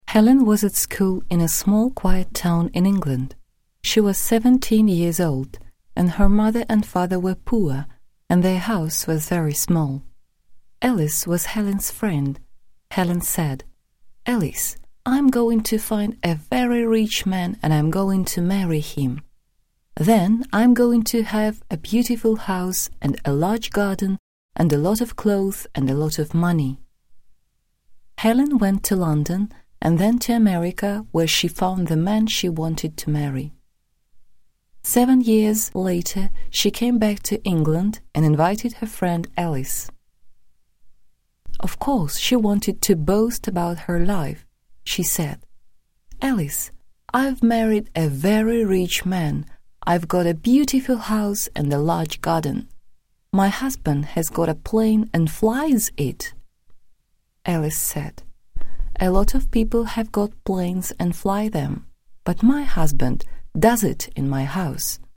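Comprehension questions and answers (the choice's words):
Choose the correct variant to complete the sentence. Ответ запиши в виде комбинации цифр и букв без пробелов и каких-либо знаков препинания, цифры должны идти по порядку. Например, 1а2d3c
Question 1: Helen found the man she wanted to marry in ______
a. Australia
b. America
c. London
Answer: America

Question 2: ___________ years later Helen came back to England.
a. ten years later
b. several years later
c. seven years later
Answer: seven years later

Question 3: Now Helen has got ______________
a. a small house and a large garden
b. a nice flat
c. a beautiful house and a large garden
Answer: a beautiful house and a large garden

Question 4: Helen's husband has got ________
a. a ship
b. a plane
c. a train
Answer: a plane

Mark the sentences as true, false. Выбери верный вариант ответа.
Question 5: Helen lived in a big city in England.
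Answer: false

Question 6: Helen was seventeen.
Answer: true

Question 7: Helen's parents were rich.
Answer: false

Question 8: Helen wanted to get married to a rich man.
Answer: true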